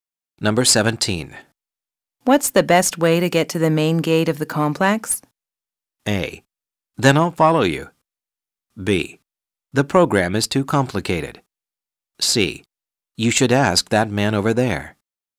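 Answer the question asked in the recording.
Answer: C: You should ask that man over there.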